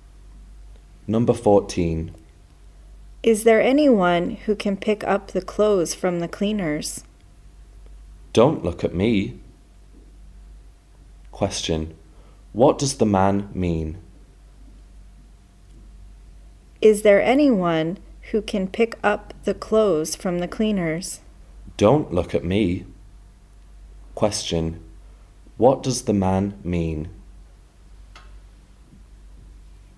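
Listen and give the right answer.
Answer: He won't pick up the clothes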